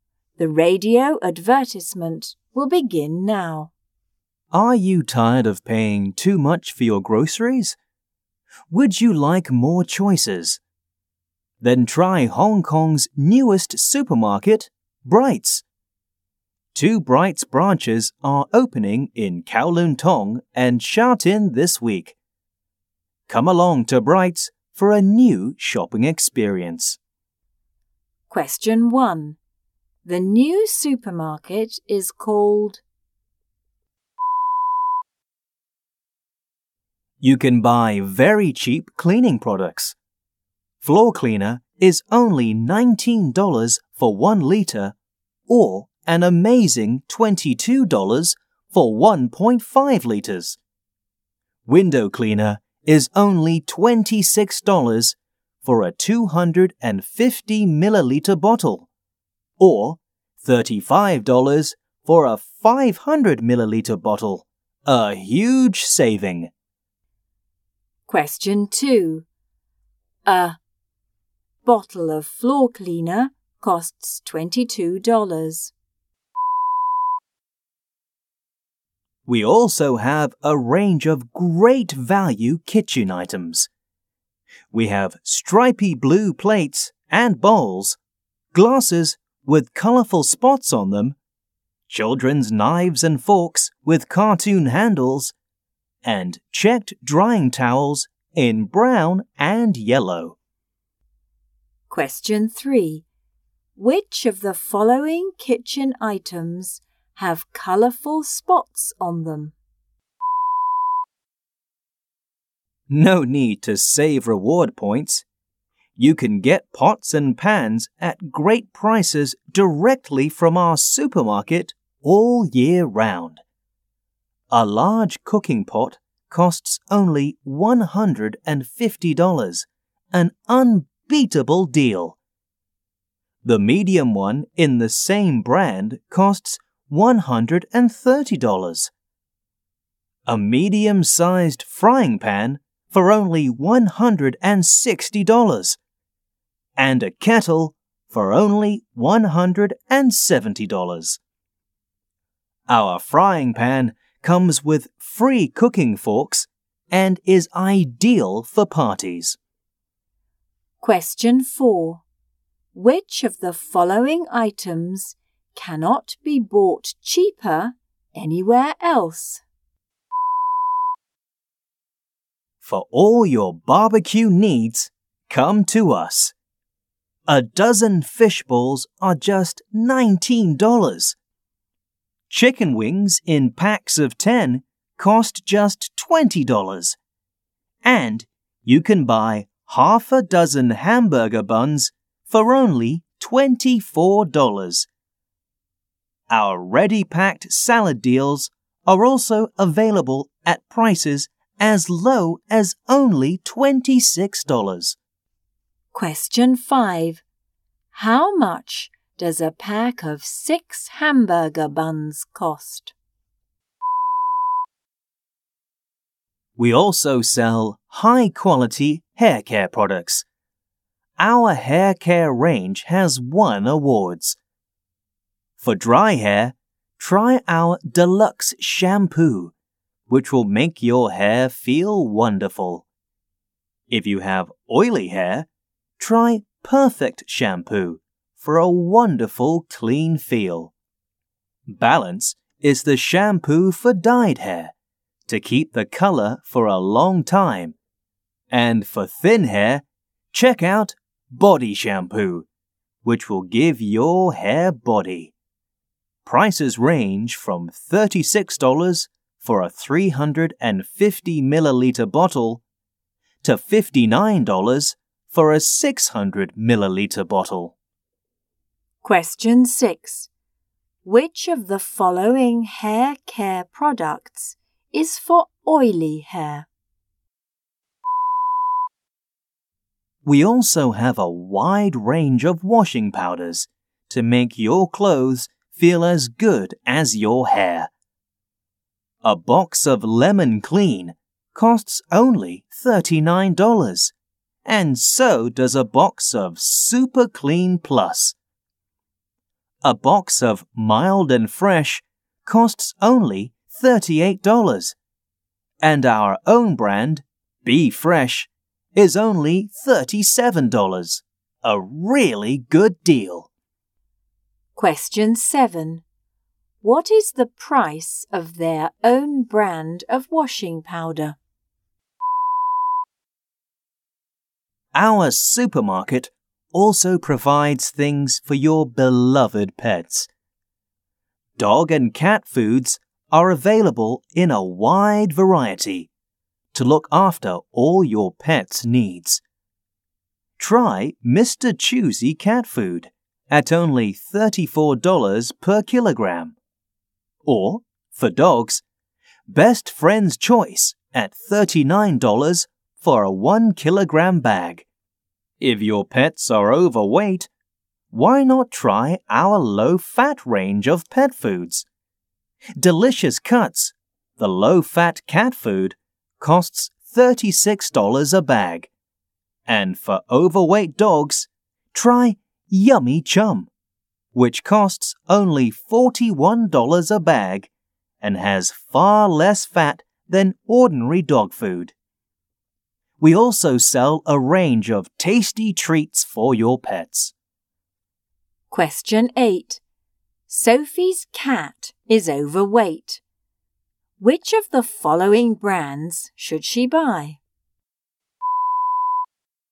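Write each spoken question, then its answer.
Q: The new supermarket is called...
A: Brights

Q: Which of the following kitchen items have colourful spots on them?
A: glasses

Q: How much does a pack of 6 hamburger buns cost?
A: $24

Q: Which of the following hair care products is for oily hair?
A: Perfect Shampoo

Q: What is the price of their own brand of washing powder?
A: $37

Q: Which of the following brands should she buy?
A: Delicious Cuts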